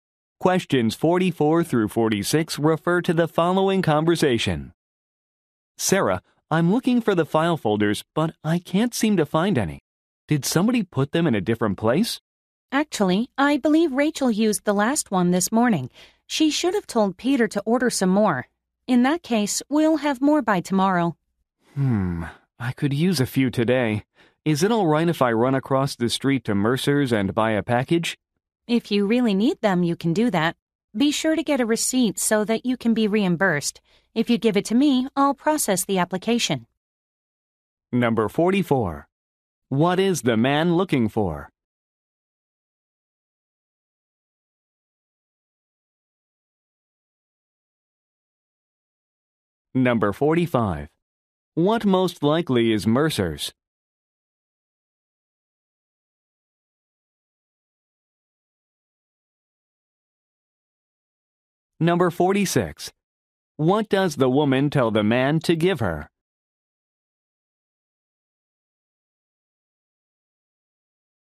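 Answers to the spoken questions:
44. File folders
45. A store that sells office supplies
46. A receipt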